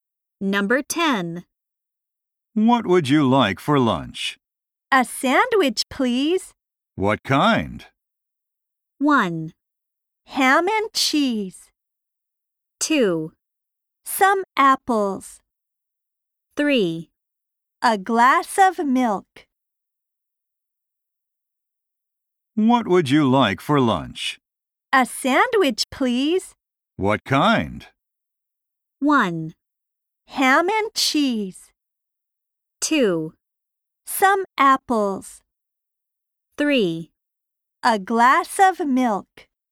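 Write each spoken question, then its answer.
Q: What kind?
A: 1: Ham and cheese.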